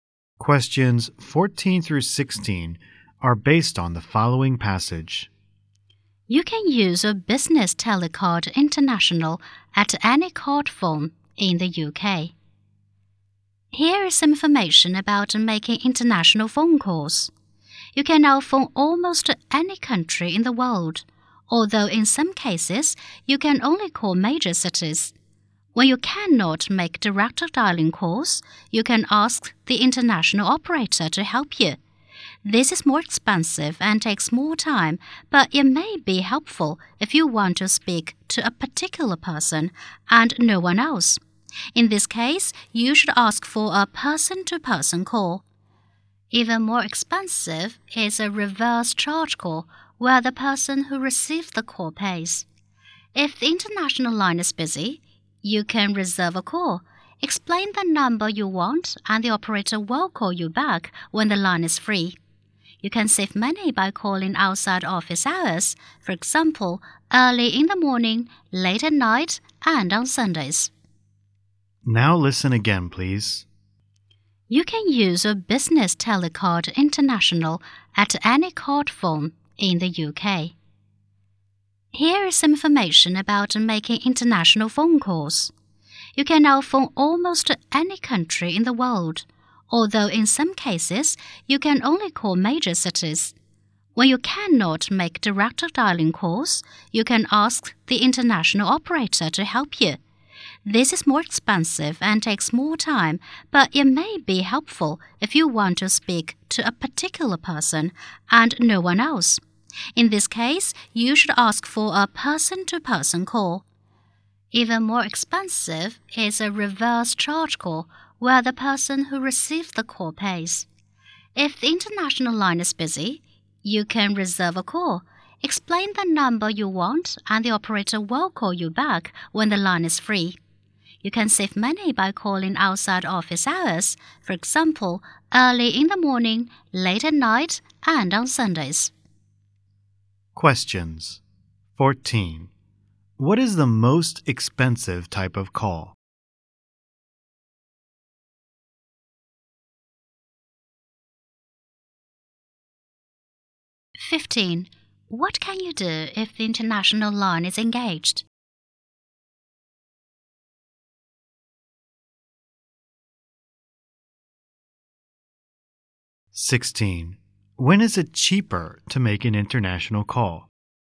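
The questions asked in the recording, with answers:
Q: What is the most expensive type of call?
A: A reverse charge call

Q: What can you do if the international line is engaged?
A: Reserve a call

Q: When is it cheaper to make an international call?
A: Outside office hours, e.g. early morning, late at night, Sundays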